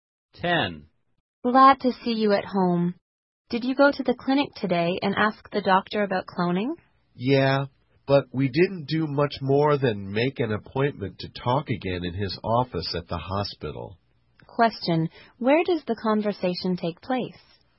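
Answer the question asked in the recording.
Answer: At home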